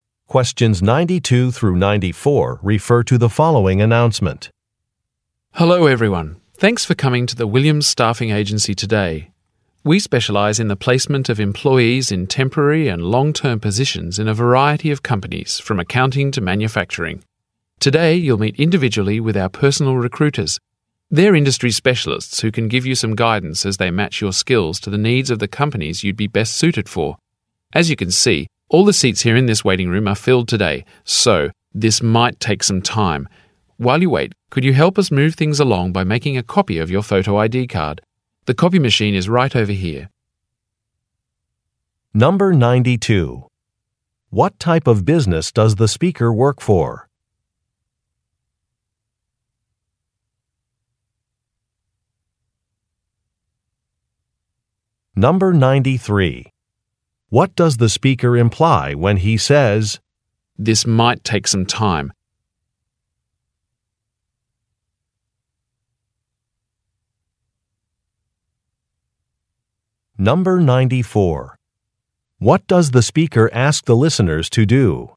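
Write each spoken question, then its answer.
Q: What type of business does the speaker work for?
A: A staffing agency

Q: What does the speaker imply when he says, "This might take some time"?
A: The listeners may have a long wait because many people are waiting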